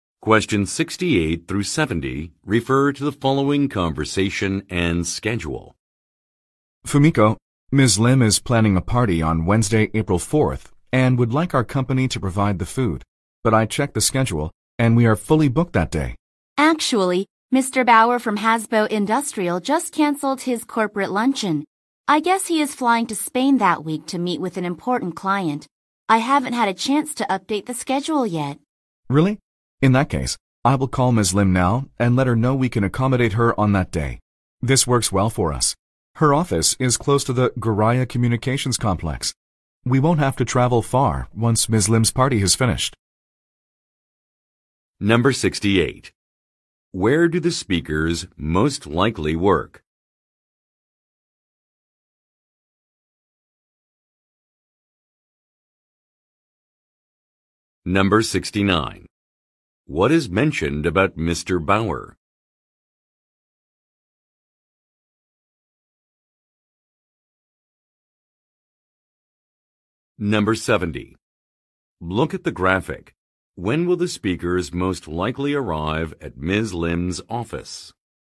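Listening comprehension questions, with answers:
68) Where do the speakers most likely work?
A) At a catering business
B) At a taxi service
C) At a moving company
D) At a marketing firm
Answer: A) At a catering business

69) What is mentioned about Mr. Bauer?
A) He is a longtime client.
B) He is a government employee.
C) He is taking a business trip.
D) He is planning a dinner party.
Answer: C) He is taking a business trip.

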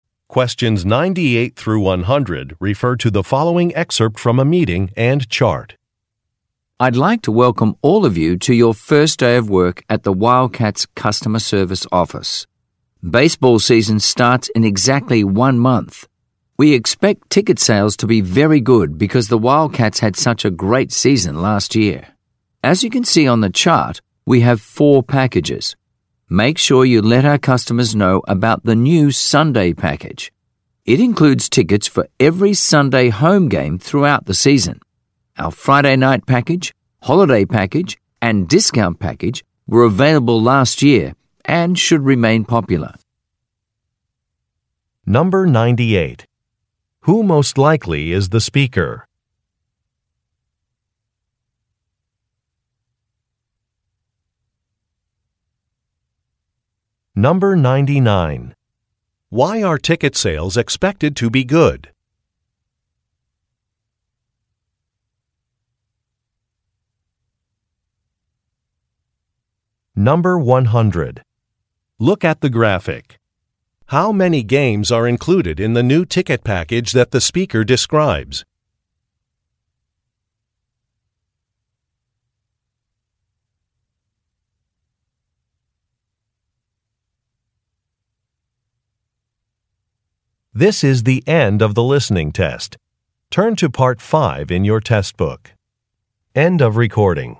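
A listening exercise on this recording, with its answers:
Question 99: Why are ticket sales expected to be good?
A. The prices have been reduced.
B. The team's previous season was successful.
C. There is a new advertising campaign.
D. The team has many new players.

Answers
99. B. The team's previous season was successful.

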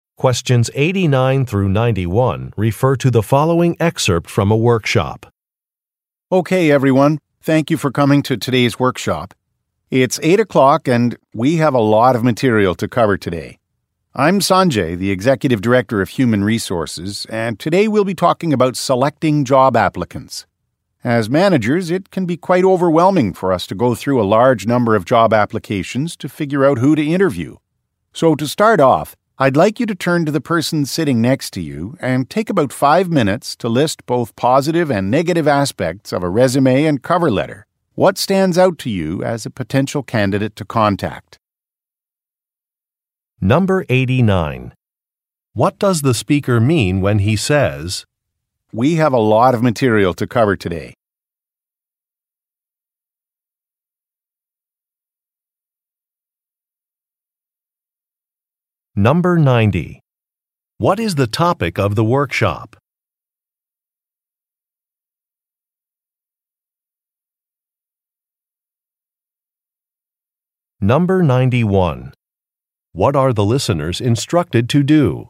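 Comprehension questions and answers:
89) What does the speaker mean when he says, "we have a lot of material to cover today"?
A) He is upset about an assignment.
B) He wants to begin immediately.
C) He is too busy to attend a meeting.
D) He needs assistance with a presentation.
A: B) He wants to begin immediately.

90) What is the topic of the workshop?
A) Effective communication skills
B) Managing department finances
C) Improving productivity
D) Choosing job applicants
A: D) Choosing job applicants

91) What are the listeners instructed to do?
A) Submit a résumé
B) Log in to a database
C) Show identification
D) Work with a partner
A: D) Work with a partner

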